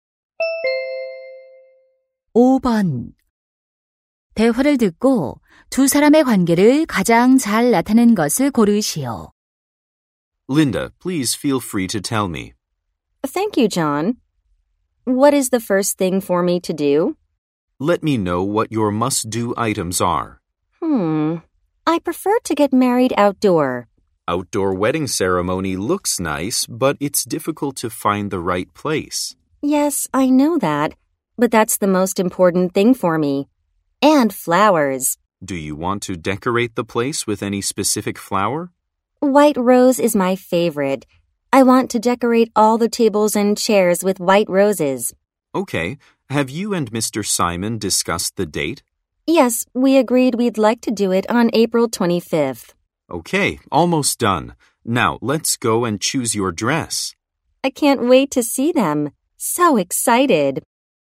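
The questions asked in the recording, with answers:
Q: 대화를 듣고 두 사람의 관계를 가장 잘 나타낸 것을 고르시오.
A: 웨딩 플래너 - 신부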